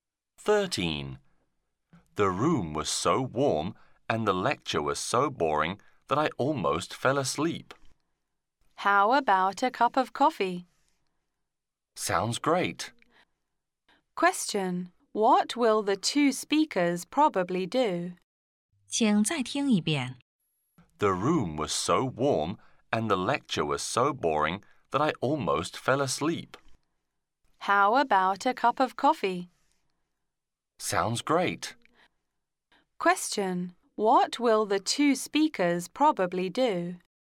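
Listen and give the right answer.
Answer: Have a cup of coffee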